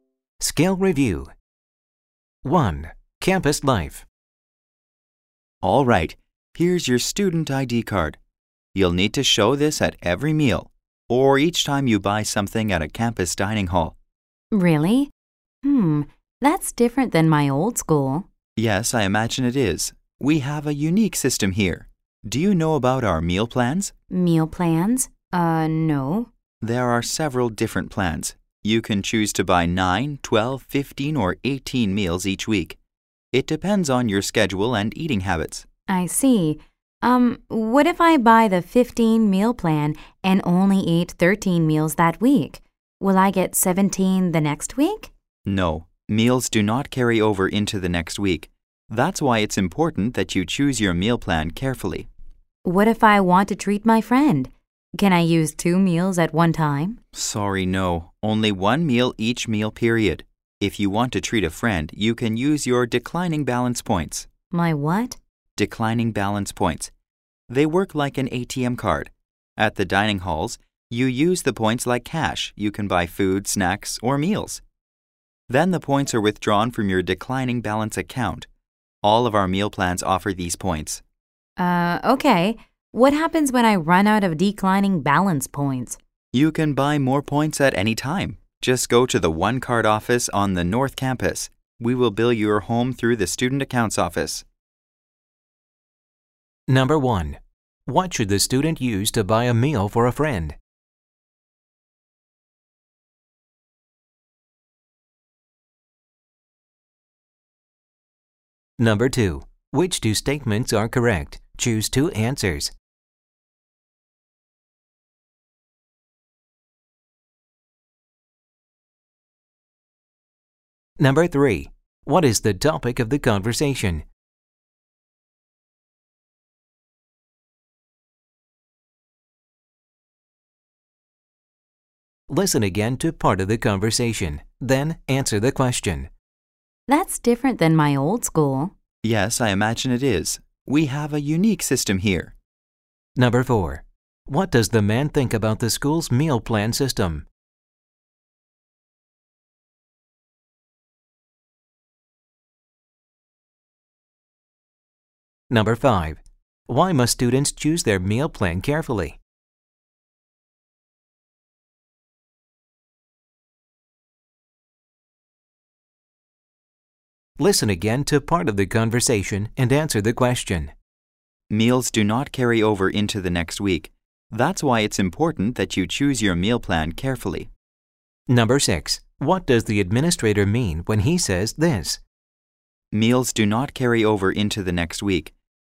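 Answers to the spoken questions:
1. Declining balance points
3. The campus meal plans and how to pay for meals
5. Unused meals do not carry over into the next week
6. Meals you don't use in a week are lost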